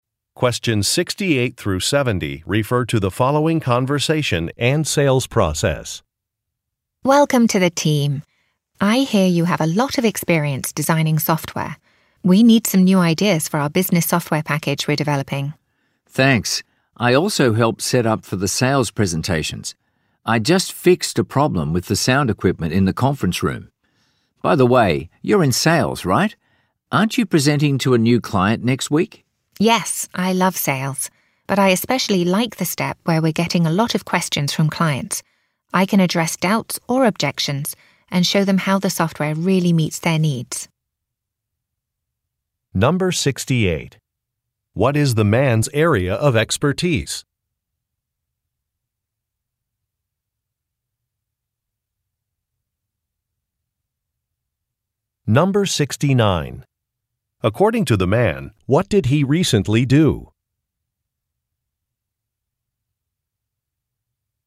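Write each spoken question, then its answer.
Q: What is the man's area of expertise?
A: Designing software

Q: According to the man, what did he recently do?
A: He fixed a problem with the sound equipment in the conference room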